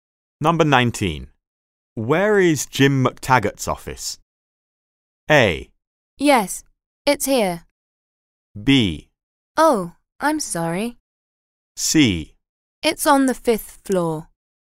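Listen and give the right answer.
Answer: C: It's on the 5th floor.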